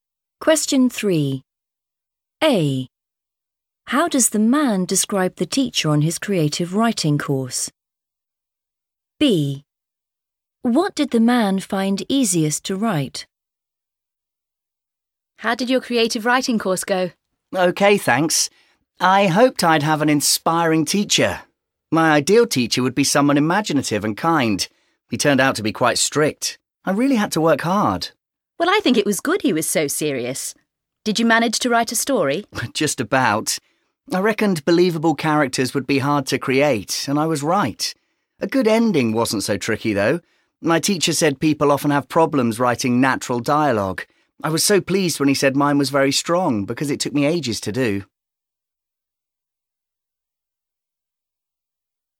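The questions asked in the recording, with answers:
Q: How does the man describe the teacher on his creative writing course?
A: quite strict

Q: What did the man find easiest to write?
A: a good ending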